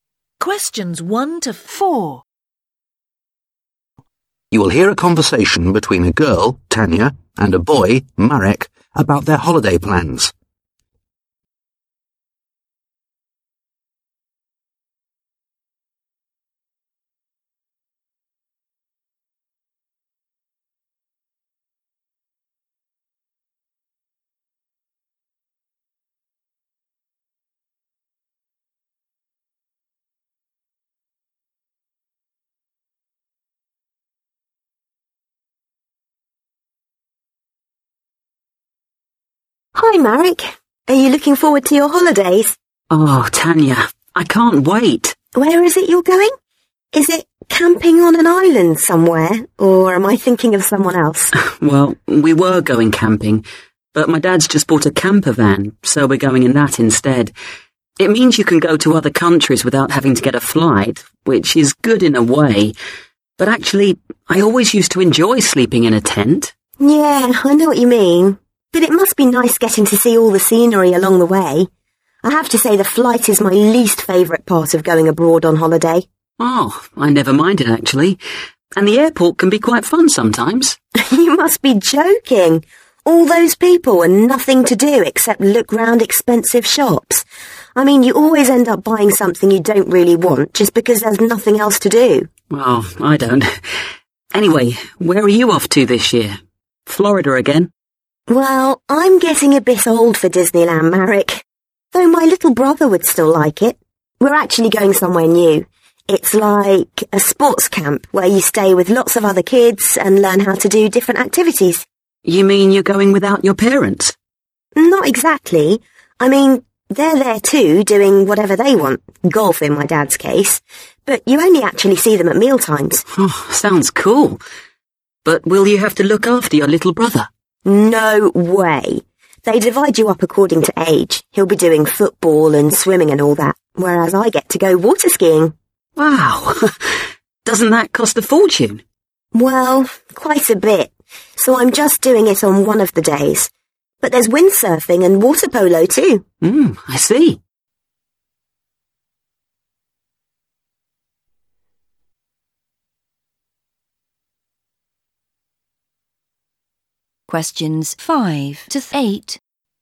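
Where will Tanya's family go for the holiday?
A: A sports camp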